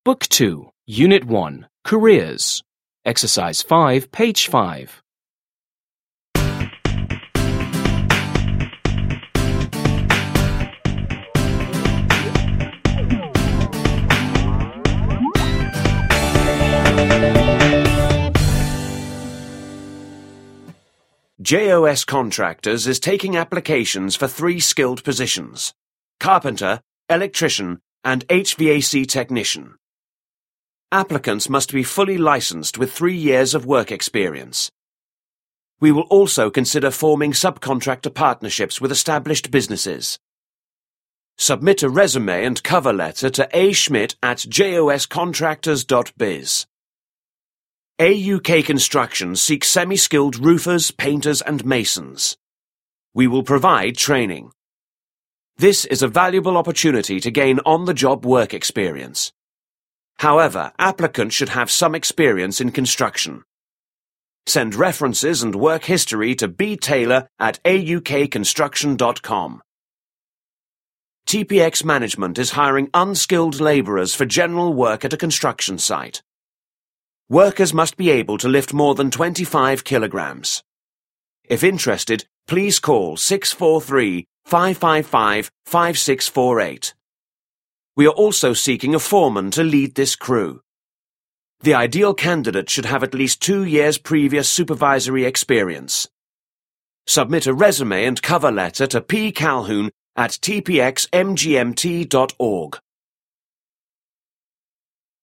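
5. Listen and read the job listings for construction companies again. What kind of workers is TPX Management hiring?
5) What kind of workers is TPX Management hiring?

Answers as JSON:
{"5": "Unskilled laborers and a foreman"}

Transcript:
JOS Contractors is taking applications for three skilled positions: carpenter, electrician, and HVAC technician. Applicants must be fully licensed with three years of work experience. We will also consider forming subcontractor partnerships with established businesses. Submit a resume and cover letter to aschmitt@joscontractors.biz.
AUK Construction seeks semiskilled roofers, painters, and masons. We will provide training. This is a valuable opportunity to gain on-the-job work experience. However, applicants should have some experience in construction. Send references and work history to btaylor@aukconstruction.com.
TPX Management is hiring unskilled laborers for general work at a construction site. 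Workers must be able to lift more than 25 kilograms. If interested, please call (643) 555-5648. We are also seeking a foreman to lead this crew. The ideal candidate should have at least two years' previous supervisory experience.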